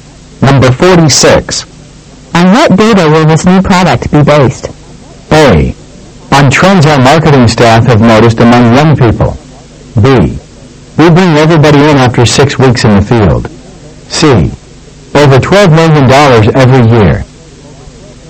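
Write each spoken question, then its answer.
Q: On what data will this new product be based?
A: A: On trends our marketing staff have noticed among young people.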